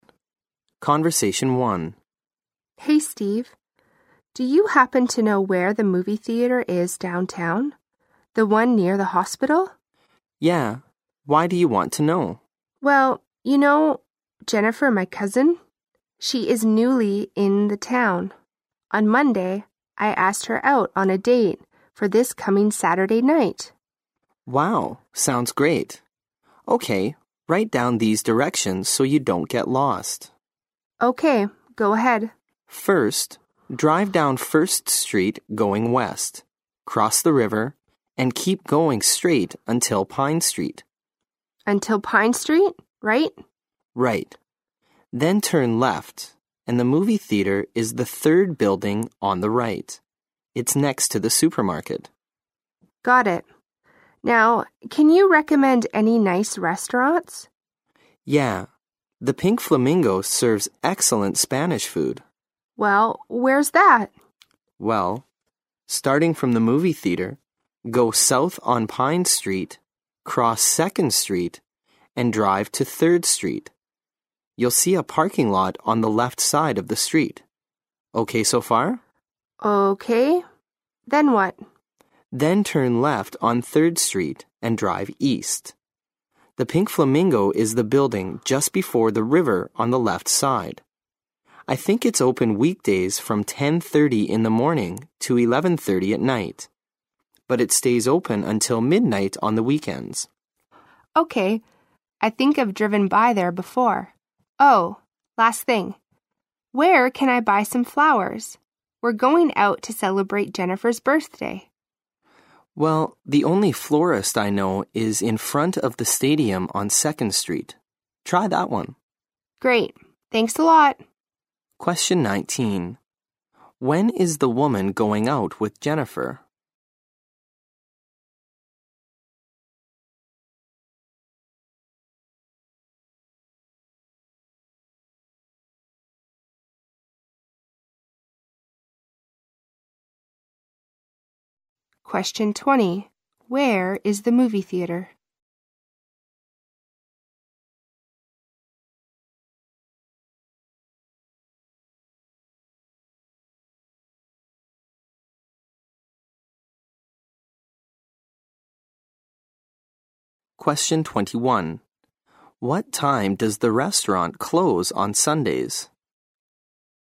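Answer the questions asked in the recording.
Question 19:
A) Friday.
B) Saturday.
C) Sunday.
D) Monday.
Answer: B) Saturday.
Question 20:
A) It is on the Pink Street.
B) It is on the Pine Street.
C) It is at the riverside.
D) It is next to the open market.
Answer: B) It is on the Pine Street.
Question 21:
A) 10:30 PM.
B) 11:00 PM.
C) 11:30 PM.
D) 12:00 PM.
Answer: D) 12:00 PM.

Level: 六级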